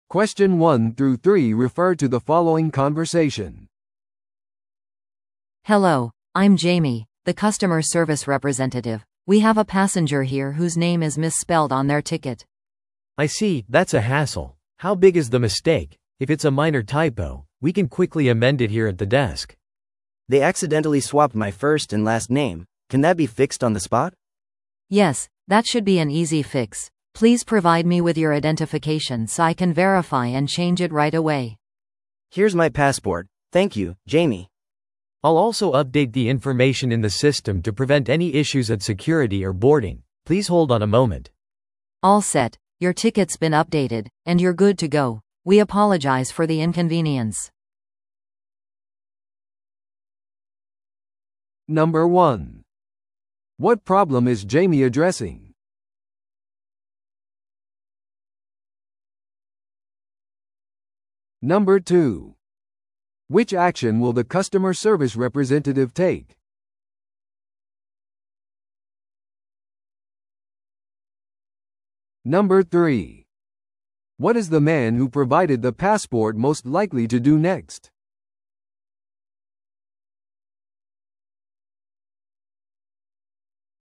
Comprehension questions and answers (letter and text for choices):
Listen to the audio below and answer the questions.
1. What problem is Jamie addressing?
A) 乗客がチケットを紛失した。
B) チケットの名前がパスポートと一致していない。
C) 乗客がフライトに乗り遅れた。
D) フライトがオーバーブッキングしている。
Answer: B) チケットの名前がパスポートと一致していない。

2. Which action will the customer service representative take?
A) 乗客の予約をキャンセルする。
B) 乗客を後のフライトに再予約する。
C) チケットの名前を確認して訂正する。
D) そのミスに対する補償を提供する。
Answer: C) チケットの名前を確認して訂正する。

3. What is the man who provided the passport most likely to do next?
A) 名前の訂正を待つ。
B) エラーによる返金を求める。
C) フライトのために荷物を預ける。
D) 不便についての苦情を書く。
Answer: A) 名前の訂正を待つ。

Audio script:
A: Hello, I'm Jamie, the customer service representative. We have a passenger here whose name is misspelled on their ticket.
B: I see, that's a hassle. How big is the mistake? If it's a minor typo, we can quickly amend it here at the desk.
C: They accidentally swapped my first and last name. Can that be fixed on the spot?
A: Yes, that should be an easy fix. Please provide me with your identification so I can verify and change it right away.
C: Here's my passport. Thank you, Jamie.
B: I'll also update the information in the system to prevent any issues at security or boarding. Please hold on a moment.
A: All set! Your ticket's been updated, and you're good to go. We apologize for the inconvenience.